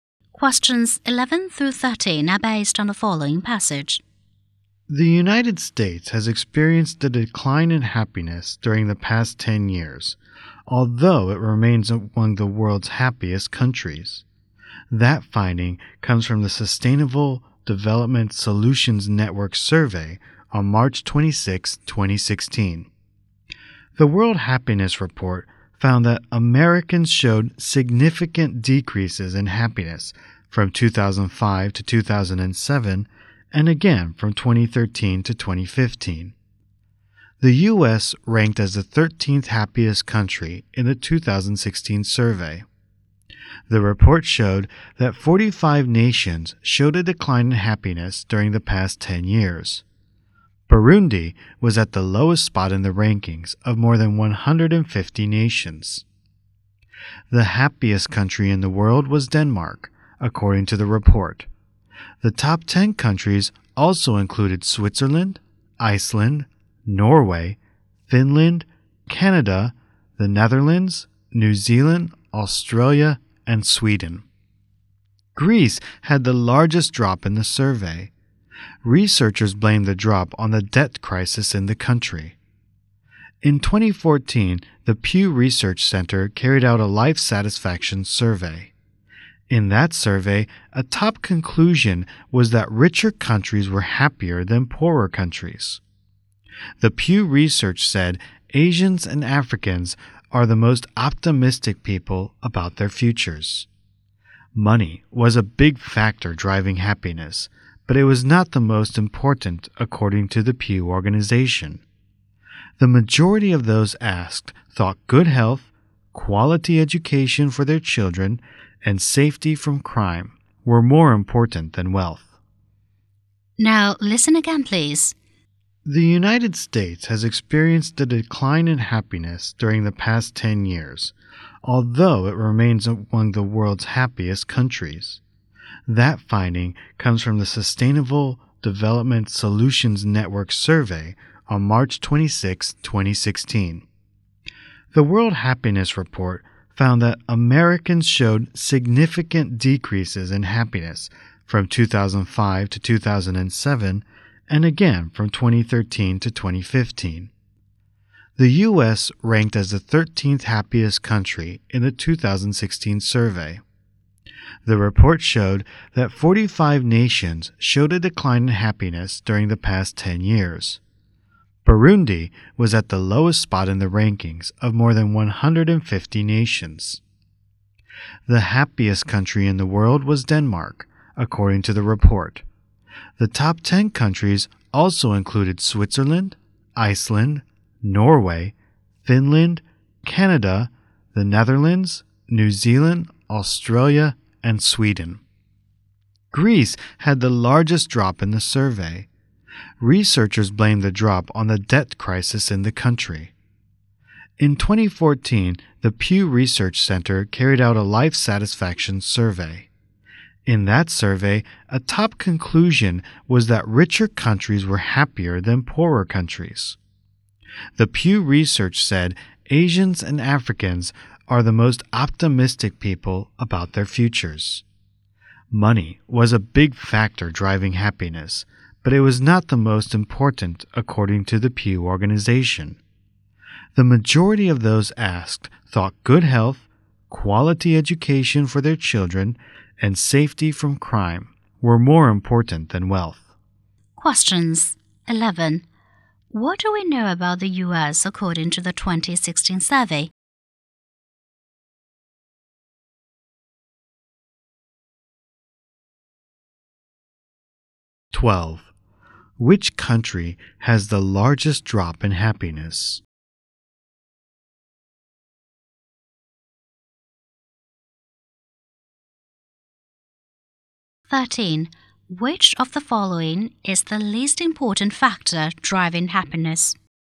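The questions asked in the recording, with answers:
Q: Which country has the largest drop in happiness?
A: Greece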